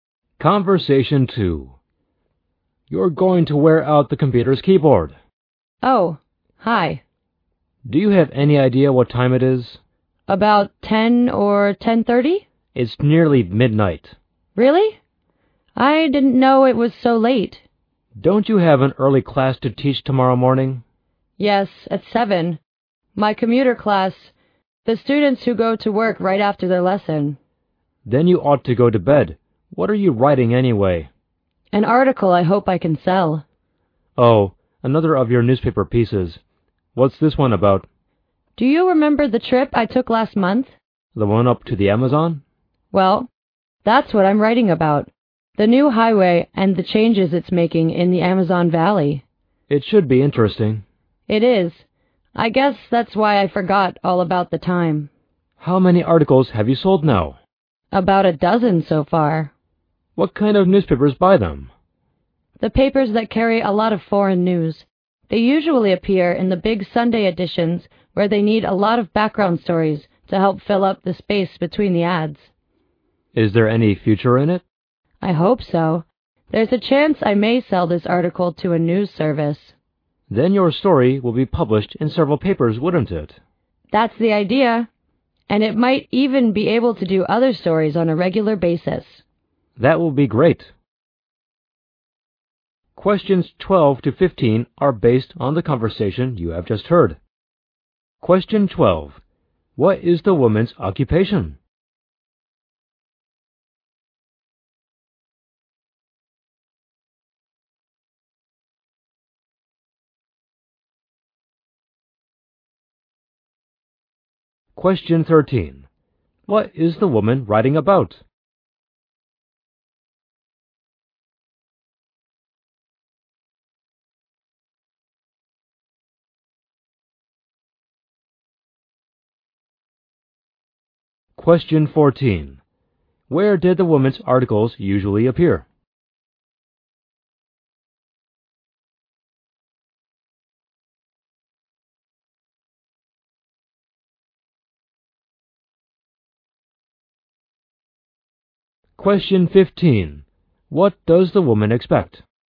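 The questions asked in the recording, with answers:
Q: What is the woman's occupation?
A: A teacher who also writes newspaper articles.

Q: What is the woman writing about?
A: The new highway and the changes it's making in the Amazon Valley.

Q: Where did the woman's articles usually appear?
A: In the big Sunday editions of papers that carry a lot of foreign news.

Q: What does the woman expect?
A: To sell her article to a news service.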